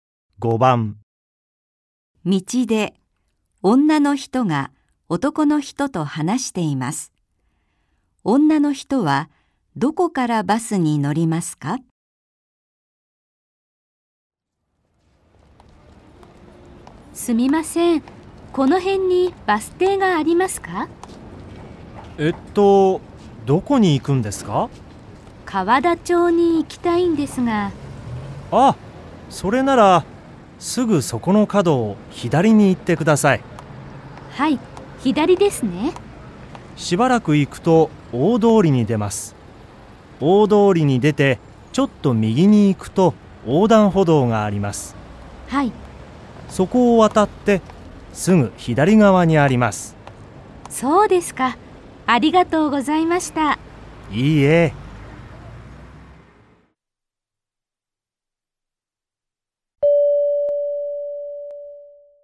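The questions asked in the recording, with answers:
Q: 女の人はどこからバスに乗りますか?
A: 大通りの横断歩道を渡ってすぐ左側のバス停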